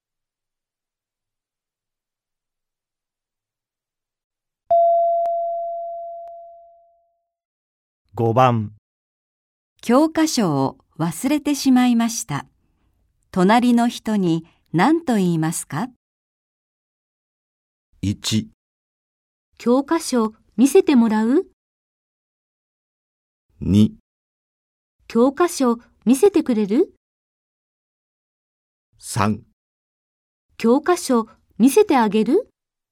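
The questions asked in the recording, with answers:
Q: 教科書を忘れてしまいました。隣の人に何と言いますか?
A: 2: 教科書見せてくれる?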